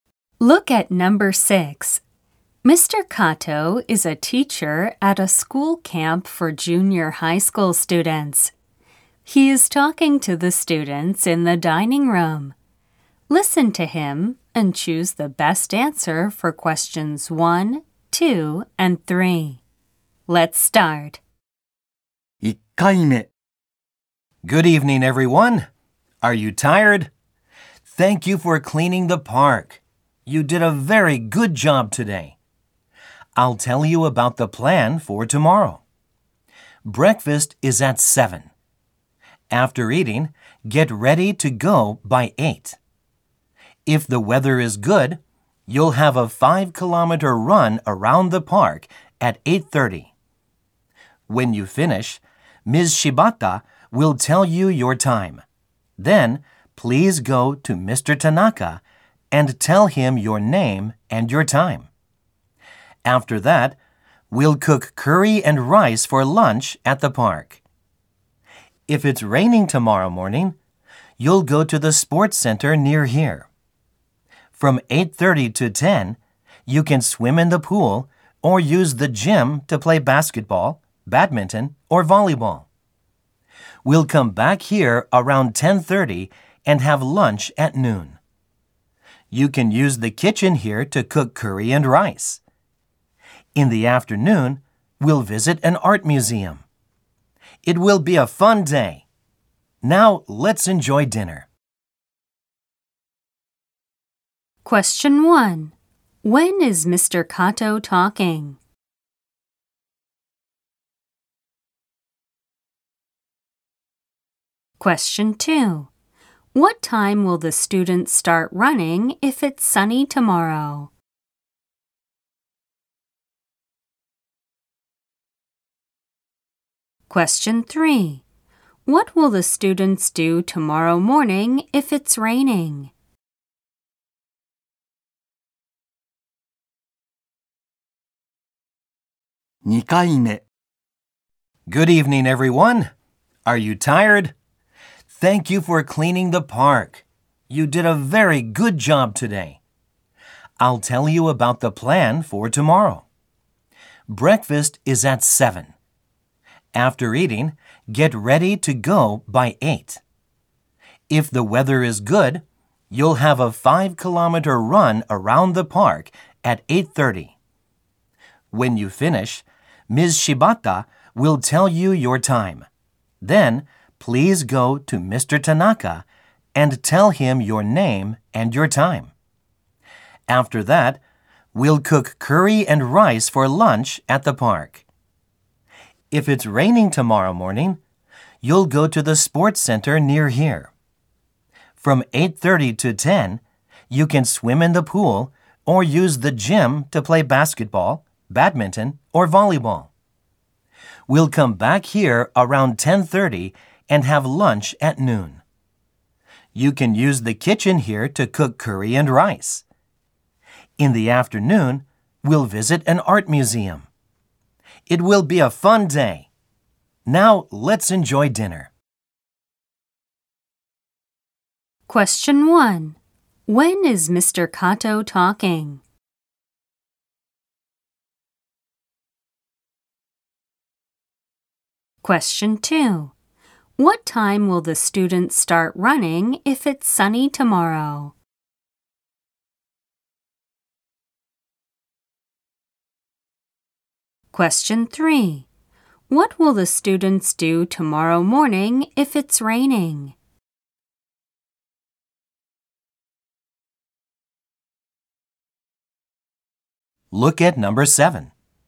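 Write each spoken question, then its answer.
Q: When is Mr. Kato talking?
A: In the evening, before dinner.

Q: What time will the students start running if it's sunny tomorrow?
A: At 8:30.

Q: What will the students do tomorrow morning if it's raining?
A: They will go to the sports center to swim or play basketball, badminton, or volleyball.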